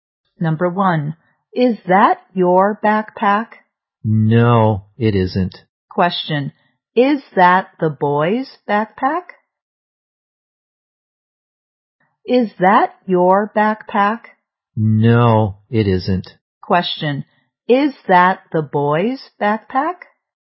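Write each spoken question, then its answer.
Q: Question, is that the boy's backpack?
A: No, it isn't.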